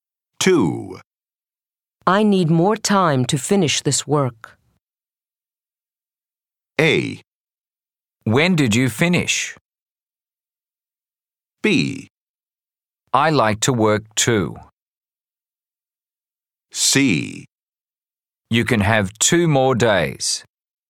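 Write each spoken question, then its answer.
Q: I need more time to finish this work.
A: C: You can have 2 more days.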